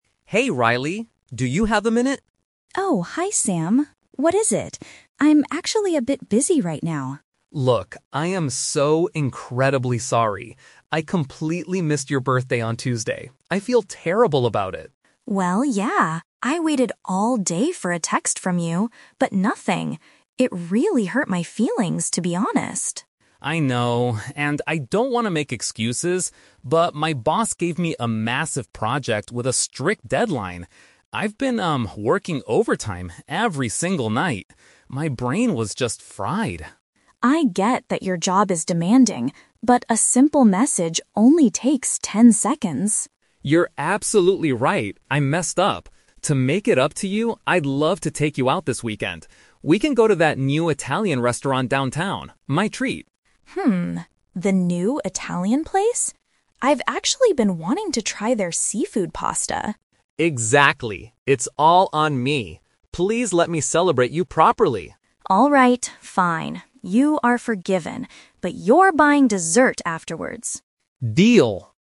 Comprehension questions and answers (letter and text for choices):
Listen to a conversation between two friends. Choose the best answer (A, B, or C) for each question.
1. Why didn't Sam contact Riley on her birthday?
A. He was overwhelmed with his professional duties.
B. He accidentally lost his mobile phone at the office.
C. He did not know the exact date of the celebration.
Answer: A. He was overwhelmed with his professional duties.

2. How did Riley feel about Sam's behavior initially?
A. She was relieved because she didn't want a big party.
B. She was extremely worried about his physical health.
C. She was offended by her friend's silence.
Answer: C. She was offended by her friend's silence.

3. What is Sam's proposed solution to the problem?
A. To cook a special Italian dinner at his apartment.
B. To pay for a meal out together this weekend.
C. To buy her a luxurious piece of jewelry.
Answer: B. To pay for a meal out together this weekend.

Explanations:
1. Sam explains that his boss gave him a "massive project" and he was "working overtime every single night." Paraphrasing: massive project and working overtime = professional duties; brain was fried = overwhelmed. Trap: Option B is a plausible real-life excuse but is not mentioned in the audio. Option C is a trap because he "missed" the day, but that was due to being busy, not because he didn't know the date.
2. Riley says she "waited all day for a text... but nothing" and that it "hurt my feelings." Paraphrasing: hurt feelings = offended; waiting for a text but getting nothing = friend's silence. Trap: Option A is the opposite of the truth; she wanted him to text her. Option B is a distractor; Sam mentions his "brain was fried" (mental exhaustion), but Riley wasn't worried about his health; she was just upset.
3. Sam offers to "take you out this weekend" to a "new Italian restaurant" and says "my treat" (which means he will pay for it). Paraphrasing: take you out / my treat = pay for a meal out. Trap: Option A is a trap. An "Italian" dinner is mentioned, but it will be at a restaurant downtown, not cooked at his apartment. Option C is not mentioned at all.

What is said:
Sam: Hey Riley... do you have a minute?
Riley: Oh, hi Sam. What is it? I'm actually a bit busy right now.
Sam: Look, I am so incredibly sorry. I completely missed your birthday on Tuesday. I feel terrible about it.
Riley: Well, yeah. I waited all day for a text from you, but nothing. It really hurt my feelings, to be honest.
Sam: I know, and I don't want to make excuses, but my boss gave me a massive project with a strict deadline. I've been, um, working overtime every single night. My brain was just fried.
Riley: I get that your job is demanding, but a simple message only takes ten seconds.
Sam: You're absolutely right. I messed up. To make it up to you, I'd love to take you out this weekend. We can go to that new Italian restaurant downtown, my treat.
the new Italian place? I've actually been wanting to try their seafood pasta.
Sam: Exactly! It's all on me. Please let me celebrate you properly.
Riley: Alright, fine. You are forgiven. But you're buying dessert afterwards!